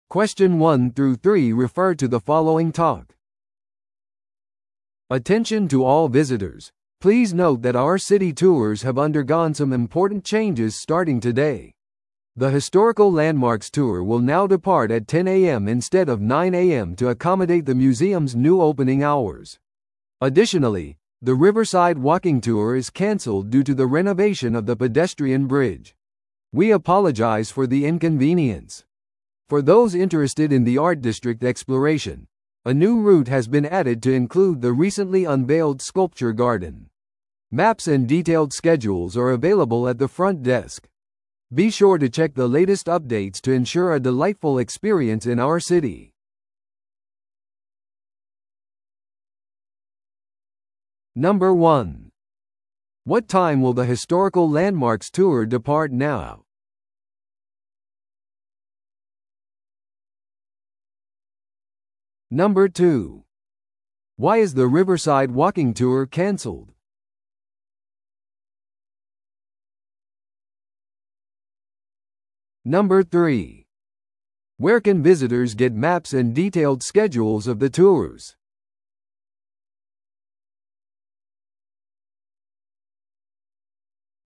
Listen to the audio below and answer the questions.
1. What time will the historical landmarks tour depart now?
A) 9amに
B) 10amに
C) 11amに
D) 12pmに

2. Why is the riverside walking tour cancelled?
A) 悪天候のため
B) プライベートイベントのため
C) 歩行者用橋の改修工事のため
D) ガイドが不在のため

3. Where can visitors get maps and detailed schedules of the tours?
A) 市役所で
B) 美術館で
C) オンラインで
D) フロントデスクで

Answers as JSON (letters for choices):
{"1": "B", "2": "C", "3": "D"}

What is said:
Attention to all visitors, please note that our city tours have undergone some important changes starting today. The historical landmarks tour will now depart at 10am instead of 9am to accommodate the museum's new opening hours. Additionally, the riverside walking tour is cancelled due to the renovation of the pedestrian bridge. We apologize for the inconvenience. For those interested in the art district exploration, a new route has been added to include the recently unveiled sculpture garden. Maps and detailed schedules are available at the front desk. Be sure to check the latest updates to ensure a delightful experience in our city.